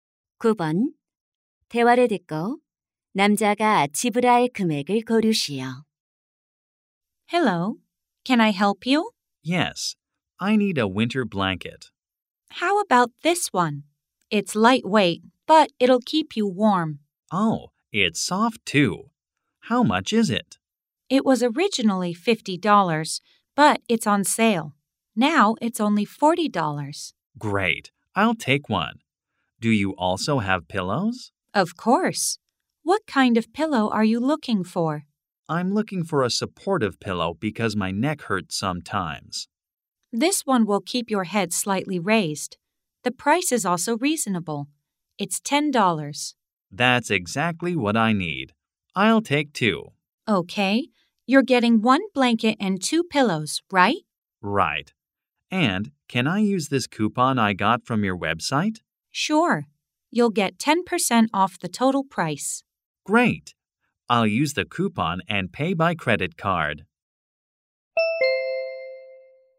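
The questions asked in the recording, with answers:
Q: 대화를 듣고 남자가 지불할 금액을 고르시오.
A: $54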